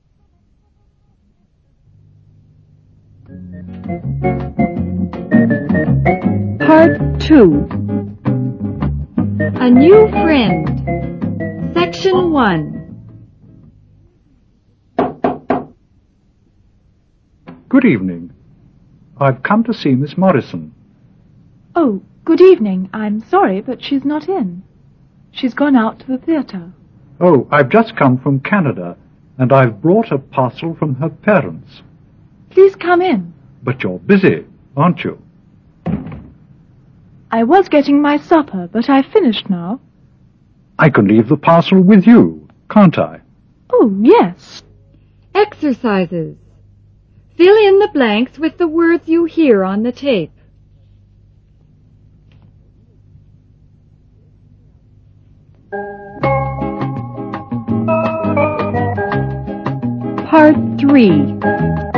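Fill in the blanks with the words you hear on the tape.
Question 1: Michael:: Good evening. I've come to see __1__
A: Miss Morrison

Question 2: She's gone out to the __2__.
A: theatre

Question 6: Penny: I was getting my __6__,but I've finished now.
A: supper

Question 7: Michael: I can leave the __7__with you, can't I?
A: parcel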